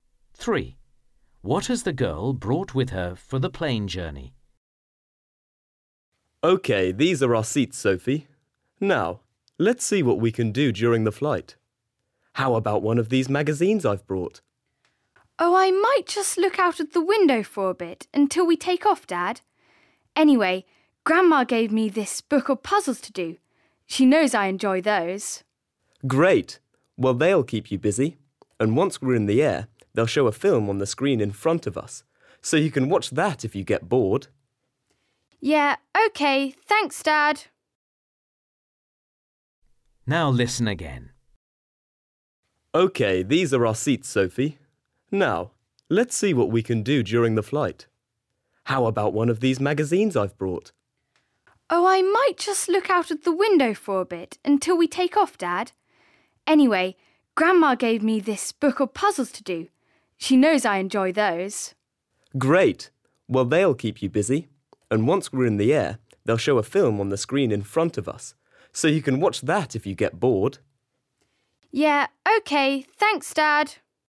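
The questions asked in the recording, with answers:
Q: What has the girl brought with her for the plane journey?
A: A book of puzzles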